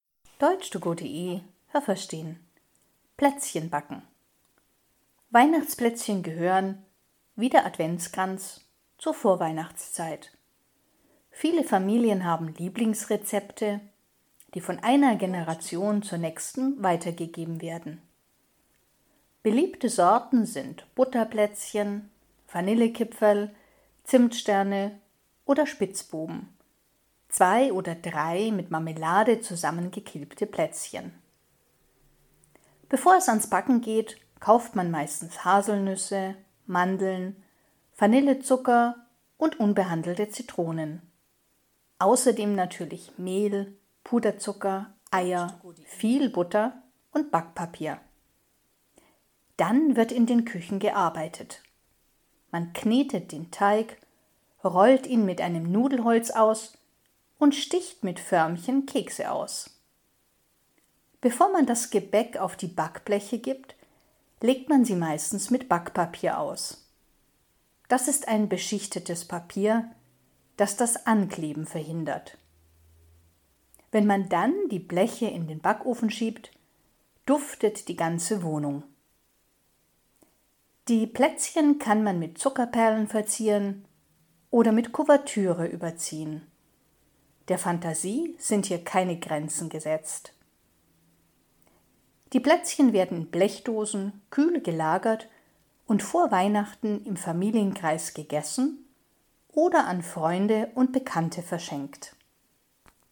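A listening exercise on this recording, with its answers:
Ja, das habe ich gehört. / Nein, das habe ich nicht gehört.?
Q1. Weihnachtsplätzchen und Adventskränze sind typisch für die Zeit vor Weihnachten.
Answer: Ja, das habe ich gehört.

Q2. Die Rezepte für bestimmte Plätzchen sind in allen Familien gleich.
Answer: Nein, das habe ich nicht gehört.

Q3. Typische Backzutaten für Weihnachtsplätzchen sind: Nüsse, Mandeln, Reis und Zucker.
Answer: Nein, das habe ich nicht gehört.

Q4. Zuerst rollt man den Teig aus, dann knetet man ihn.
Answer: Nein, das habe ich nicht gehört.

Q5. Das Backpapier legt man auf das Backblech, damit die Plätzchen sich nicht lösen.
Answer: Nein, das habe ich nicht gehört.

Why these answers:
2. Jede Familie hat Rezepte, die von Generation zu Generation weitergegeben werden.
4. Es ist umgekehrt: Zuerst knetet man den Teig, dann rollt man ihn aus.
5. Das Backpapier hilft, dass die Kekse auf dem Backblech nicht ankleben, sondern sich gut lösen.

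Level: B1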